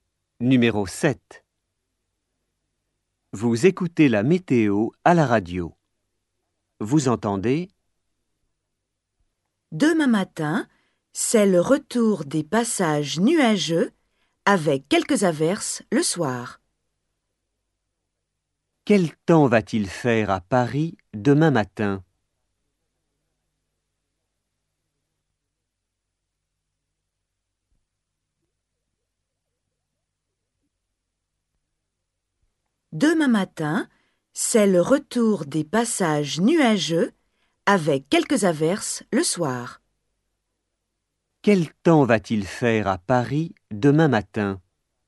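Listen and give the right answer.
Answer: nuageux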